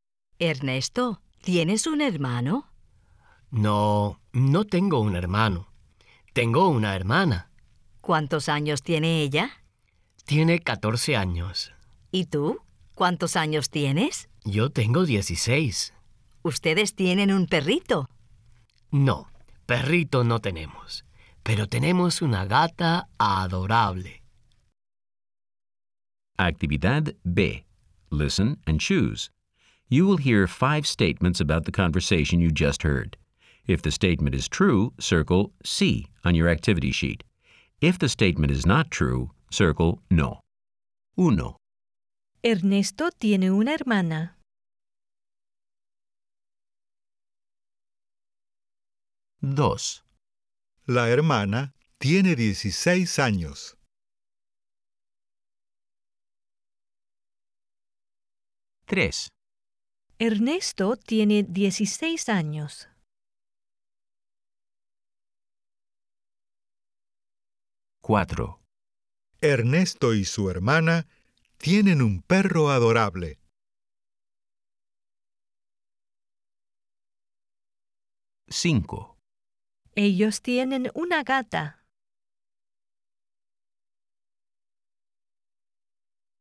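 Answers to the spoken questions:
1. Sí
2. No
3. Sí
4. No
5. Sí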